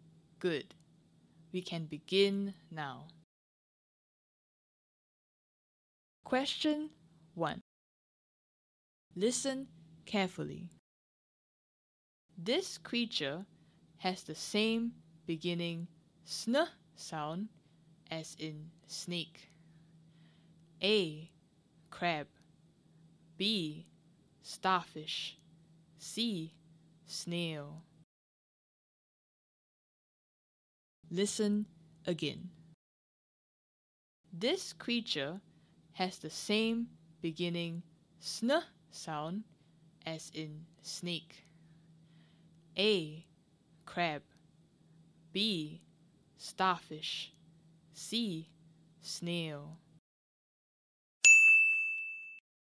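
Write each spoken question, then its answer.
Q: This creature has the same beginning sn sound as in snake.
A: C: Snail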